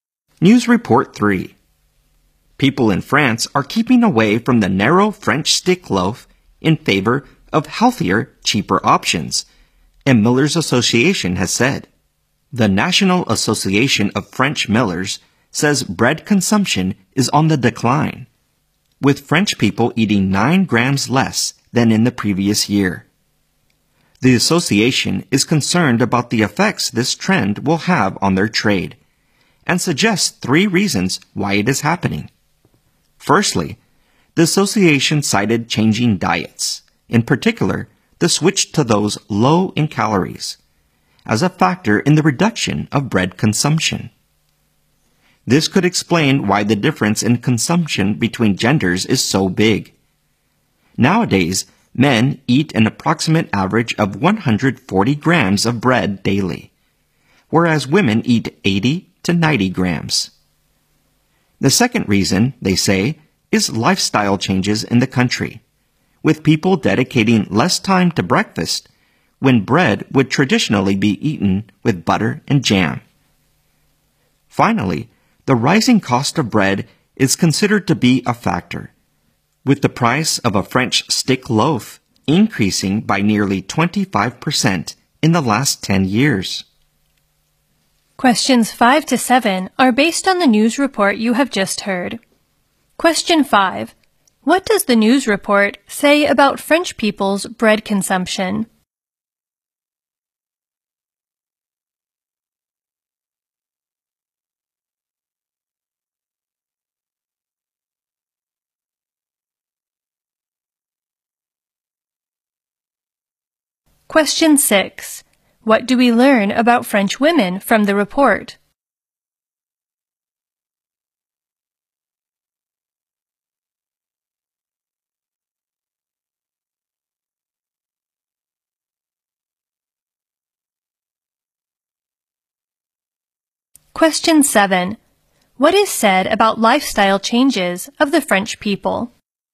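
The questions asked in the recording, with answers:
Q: What does the news report say about French people's bread consumption?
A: It is declining

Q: What do we learn about French women from the report?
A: They eat much less bread than men, about 80 to 90 grams a day

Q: What is said about lifestyle changes of the French people?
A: They spend less time on breakfast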